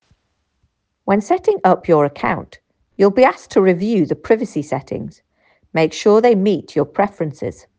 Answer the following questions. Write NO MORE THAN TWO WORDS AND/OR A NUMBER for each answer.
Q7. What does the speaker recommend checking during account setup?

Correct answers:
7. privacy

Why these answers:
When setting up your account, you'll be asked to review the privacy settings.